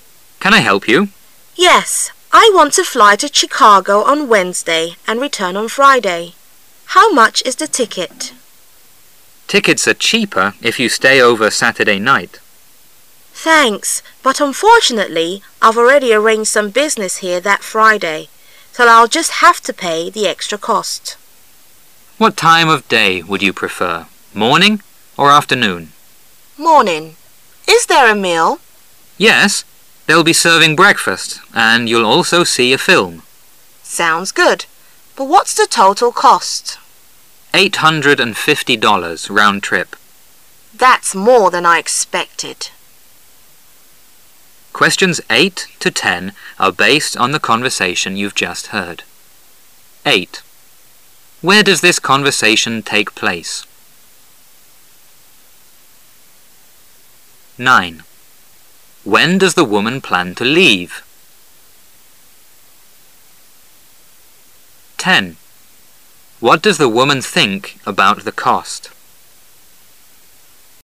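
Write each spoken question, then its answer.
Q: When does the woman plan to leave?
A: Wednesday morning

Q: What does the woman think about the cost?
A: It's more than she expected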